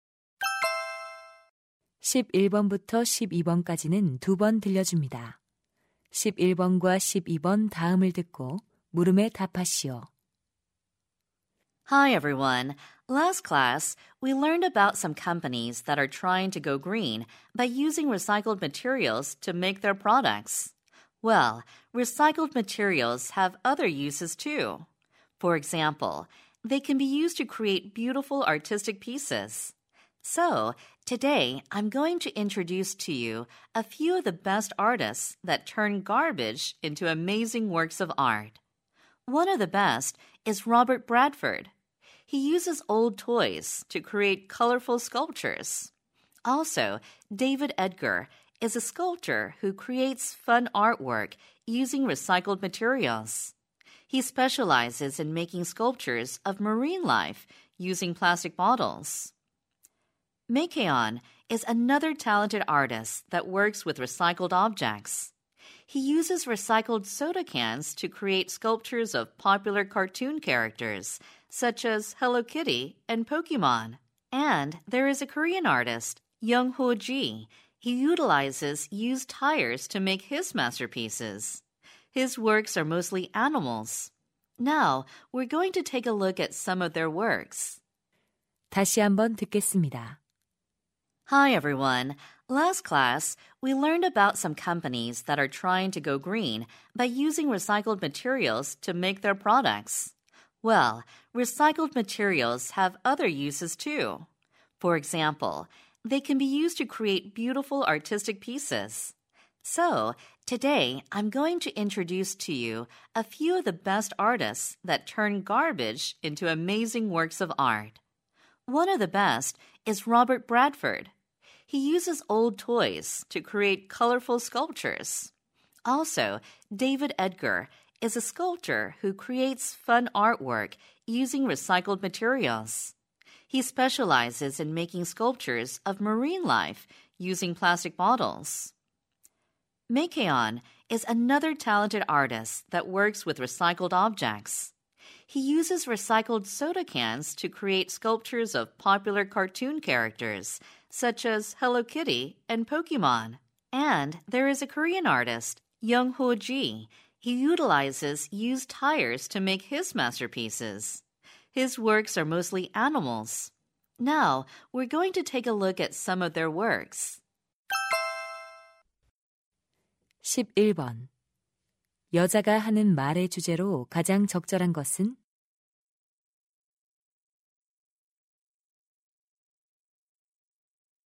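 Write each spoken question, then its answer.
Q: 여자가 하는 말의 주제로 가장 적절한 것은?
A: 재활용 재료로 작품을 만드는 예술가들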